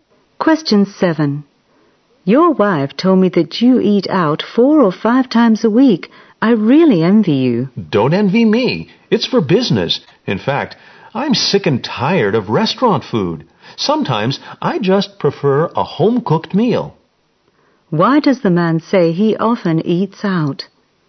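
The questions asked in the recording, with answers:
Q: Why does the man say he often eats out?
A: For business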